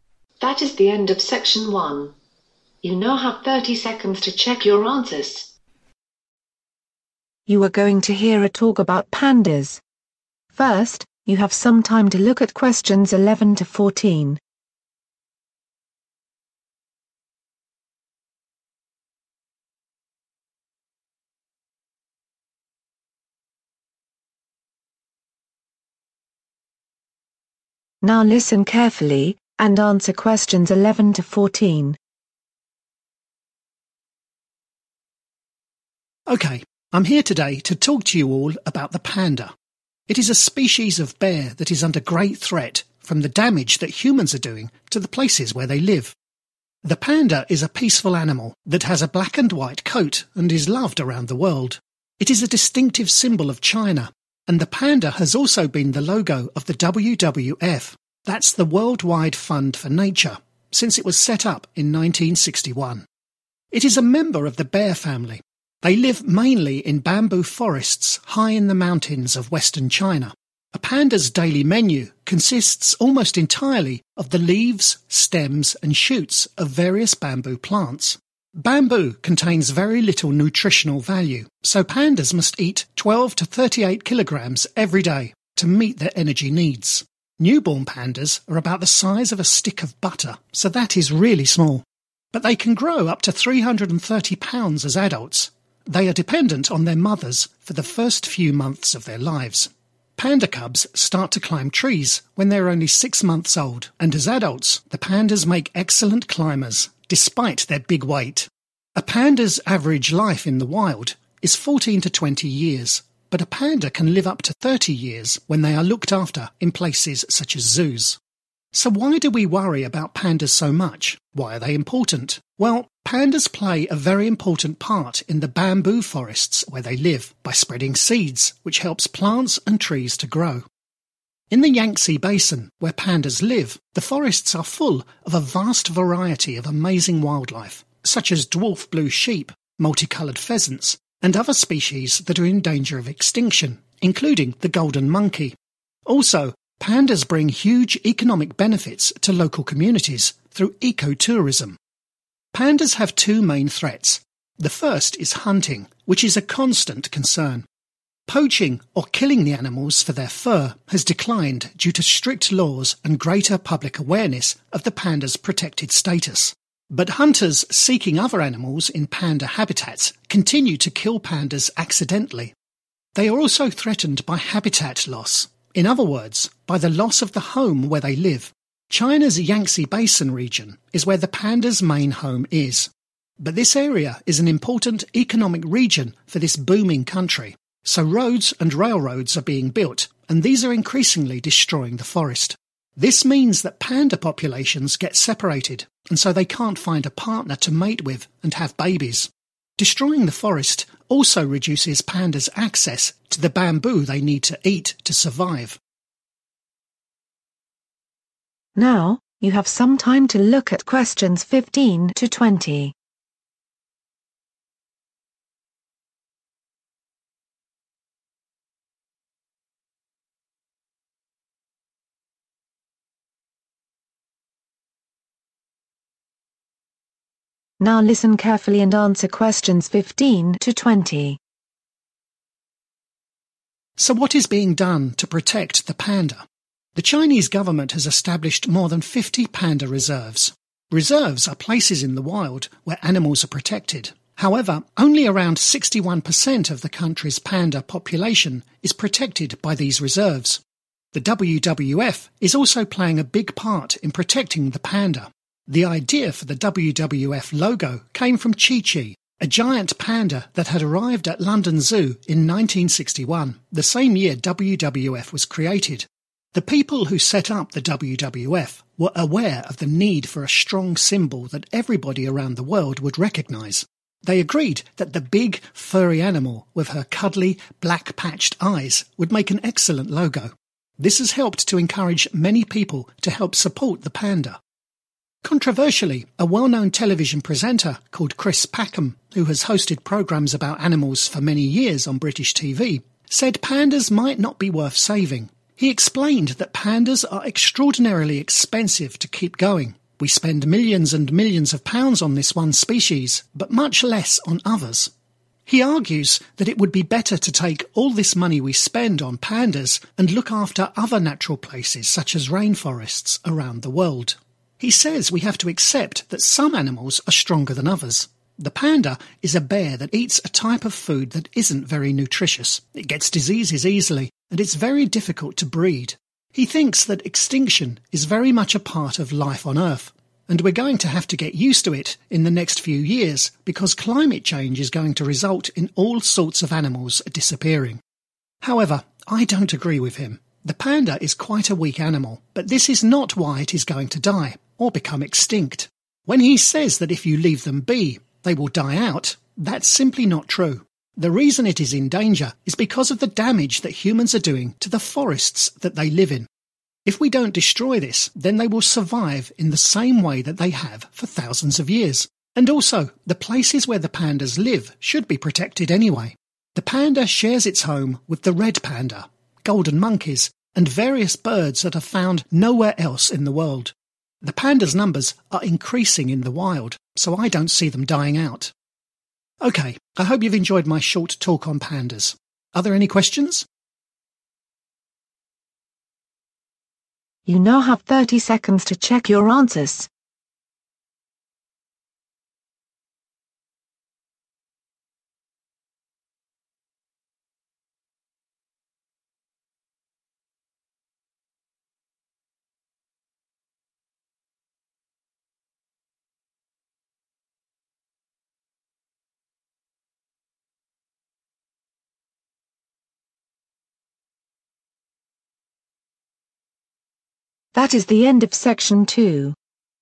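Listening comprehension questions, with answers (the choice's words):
Choose the correct letter A, B or C.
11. Each day, pandas need to eat:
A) Very little nutrition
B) 12-38 kg of bamboo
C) 330 pounds of bamboo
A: 12-38 kg of bamboo

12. If pandas are cared for away from the wild, they can live for approximately:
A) 6 months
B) 14-20 years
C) 30 years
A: 30 years

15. What proportion of the panda population in China is protected by reserves?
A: around 61%

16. What did the WWF create which encouraged people to support pandas?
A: a logo

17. They are extremely (17) to look after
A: expensive

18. They have a diet that is not (18)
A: nutritious

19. They are in danger because (19) are damaging the forests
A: humans

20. The number of pandas in the wild is (20) so they will not become extinct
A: increasing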